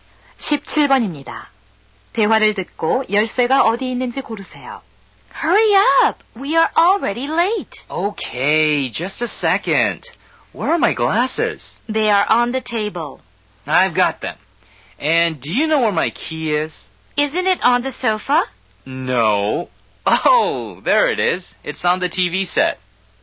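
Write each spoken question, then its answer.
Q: 대화를 듣고 열쇠가 어디 있는지 고르세요.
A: TV 위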